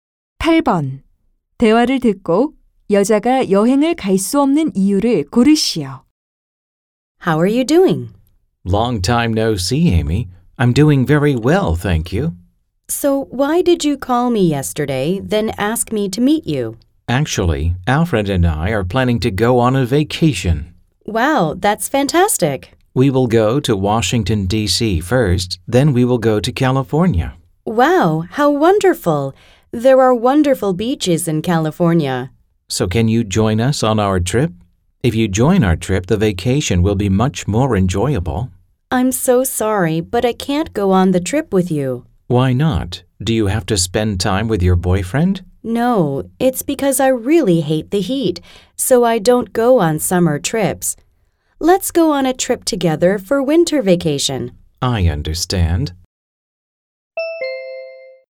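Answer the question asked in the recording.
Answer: 더위를 정말 싫어해서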